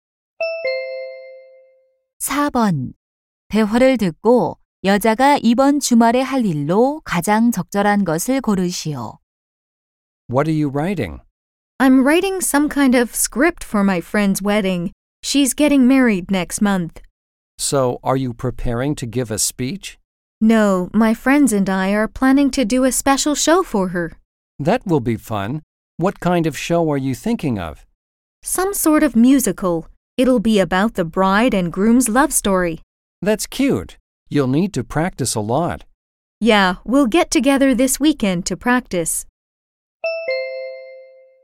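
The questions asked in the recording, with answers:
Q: 대화를 듣고 여자가 이번 주말에 할 일로 가장 적절한 것을 고르시오.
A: 친구 결혼식 뮤지컬 공연 연습하기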